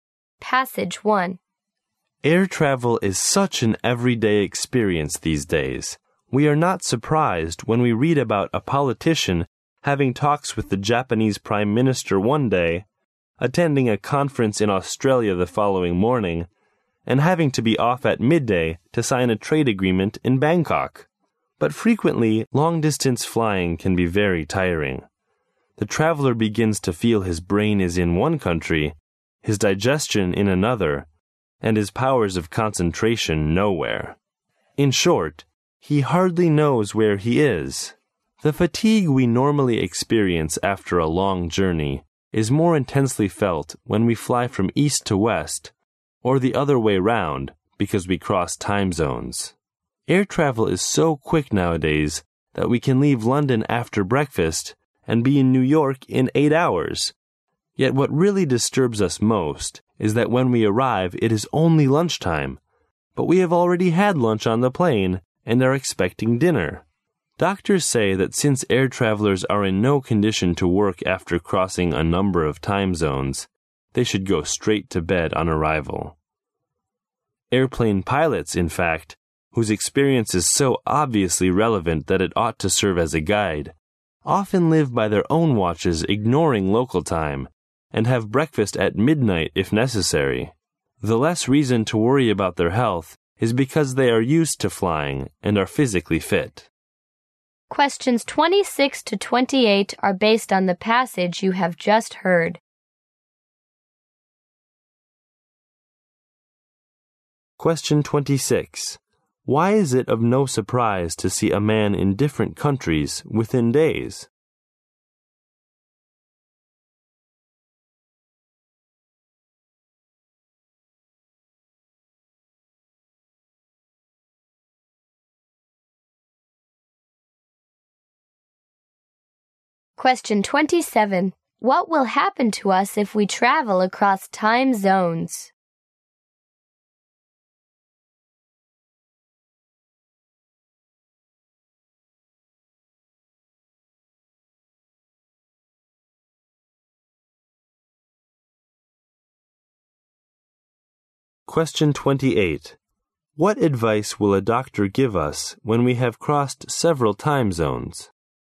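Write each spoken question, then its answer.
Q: Why is it of no surprise to see a man in different countries within days?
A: Air travel has become an everyday experience.

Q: What will happen to us if we travel across time zones?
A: We feel much more tired.

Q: What advice will a doctor give us when we have crossed several time zones?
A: Go straight to bed when you arrive.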